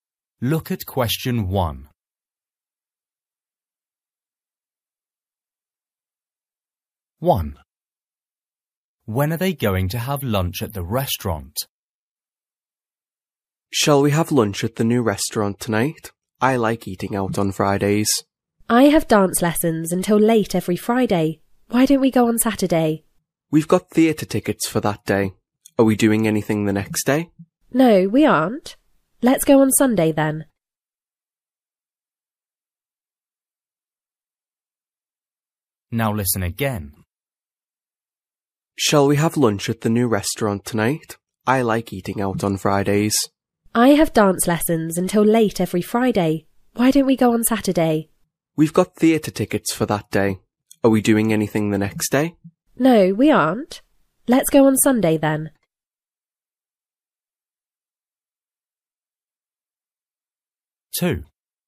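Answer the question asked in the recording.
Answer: On Sunday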